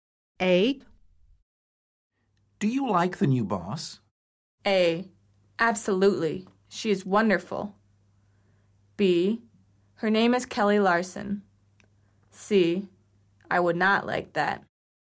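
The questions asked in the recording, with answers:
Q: Do you like the new boss?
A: A: Absolutely. She is wonderful.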